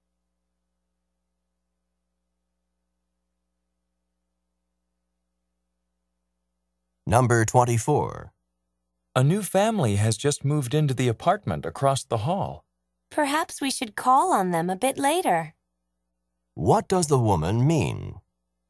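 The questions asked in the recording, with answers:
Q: What does the woman mean?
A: They should visit the new neighbors later.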